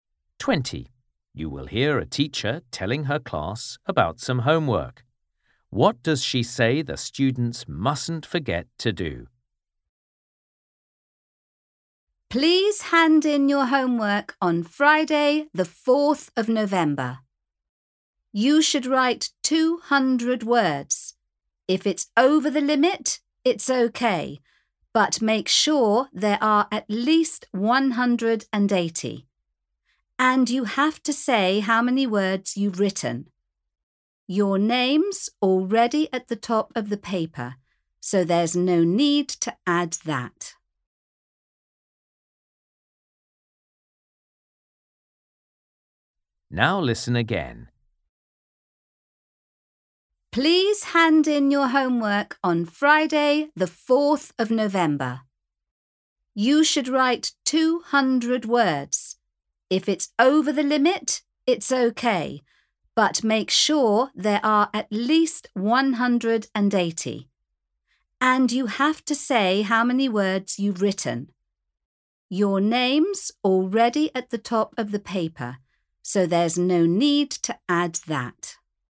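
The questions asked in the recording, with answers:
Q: What does she say the students mustn't forget to do?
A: Say how many words they've written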